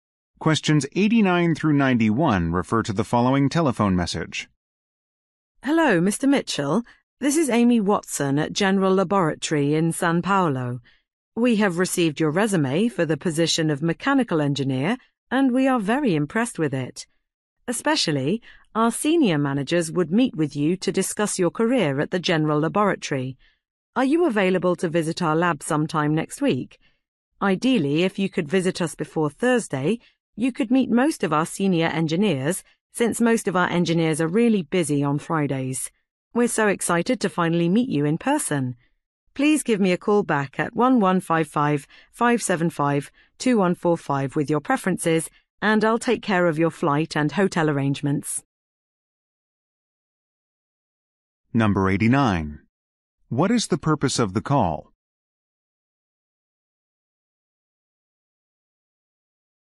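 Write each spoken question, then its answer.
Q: What is the purpose of the call?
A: To invite Mr. Mitchell to an interview at the lab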